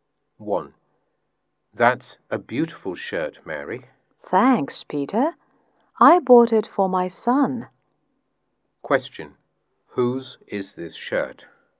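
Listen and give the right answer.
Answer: Mary's son's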